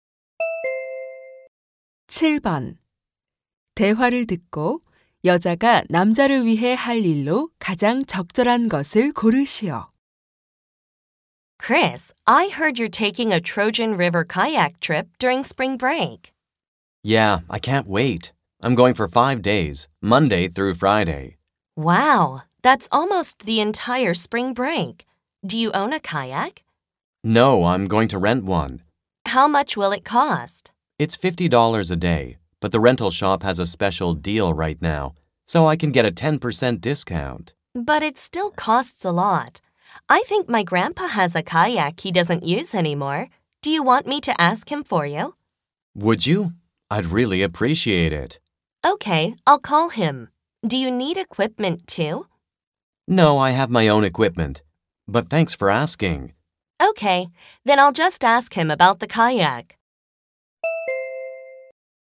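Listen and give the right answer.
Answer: 할아버지께 전화해서 카약을 빌려줄 수 있는지 묻기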